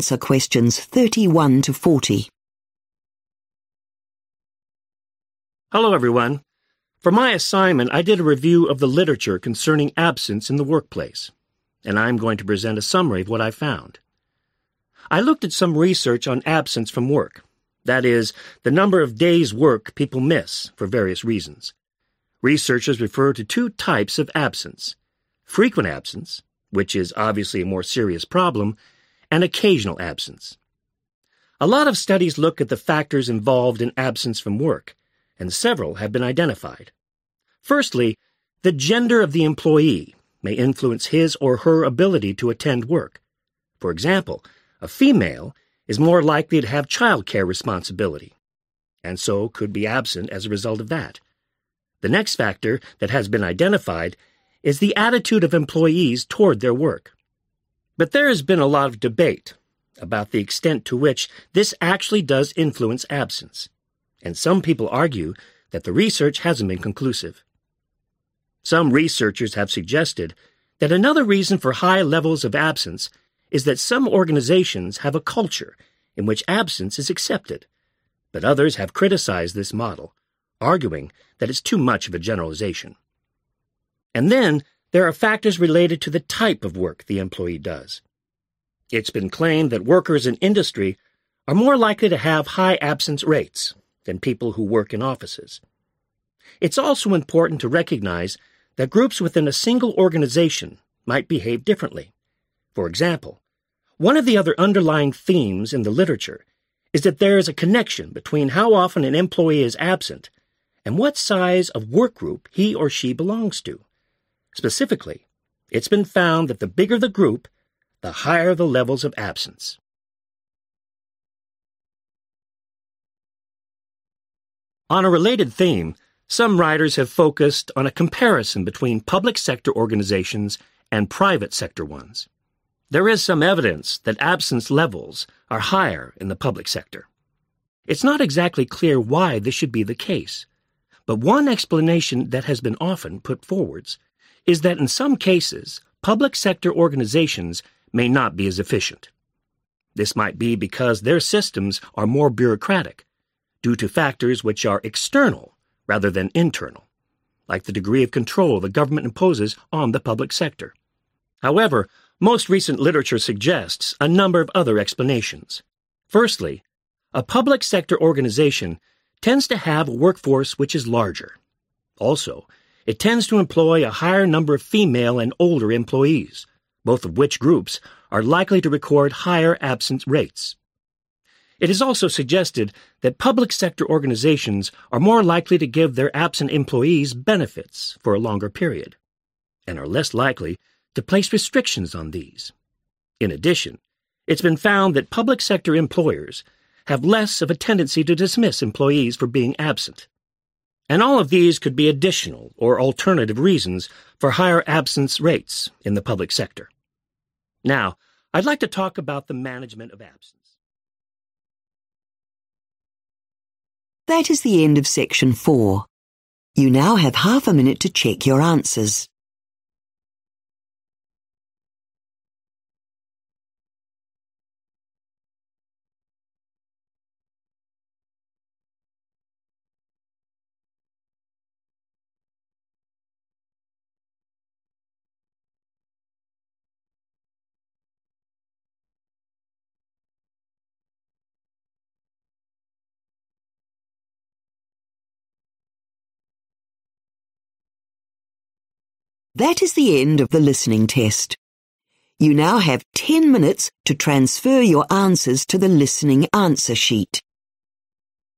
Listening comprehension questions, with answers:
Complete the notes below. Write ONE WORD ONLY for each answer.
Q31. The ______ of employees (e.g. females may have childcare responsibilities)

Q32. Employees' ______ toward work (but evidence is inconclusive)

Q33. The ______ of the organization (absence may be accepted)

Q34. Type of work — higher absence among employees in ______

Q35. The ______ of an employee's work group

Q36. Public sector has higher absence levels. Possible explanation: public sector is less ______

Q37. Systems more bureaucratic due to ______ factors (e.g. government control)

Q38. More recent literature: public sector organisations usually have a ______ workforce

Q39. Provide ______ for longer, with fewer restrictions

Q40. Are less likely to ______ employees for absence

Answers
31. gender
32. attitude
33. culture
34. industry
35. size
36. efficient
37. external
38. larger
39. benefits
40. dismiss